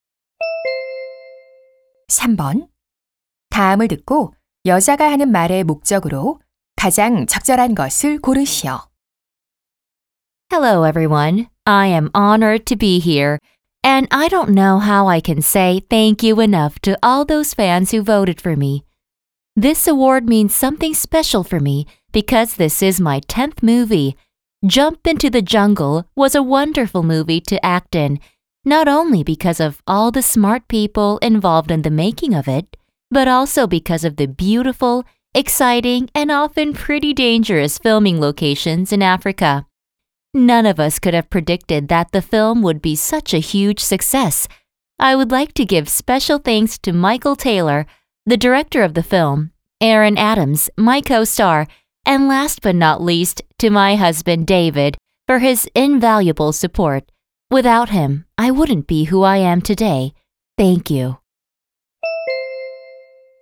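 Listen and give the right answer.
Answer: 상을 받은 것에 대해 감사 인사를 하려고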